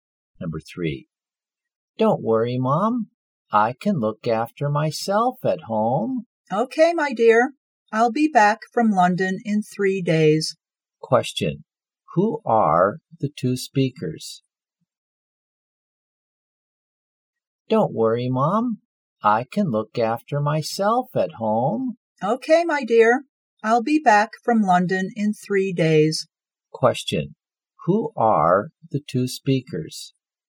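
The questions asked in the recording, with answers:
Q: Question, who are the two speakers?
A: A mother and her child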